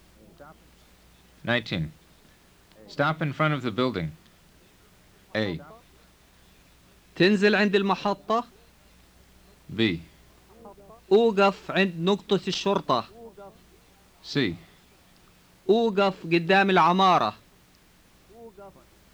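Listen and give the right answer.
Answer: C: أوقف قدام العمارة.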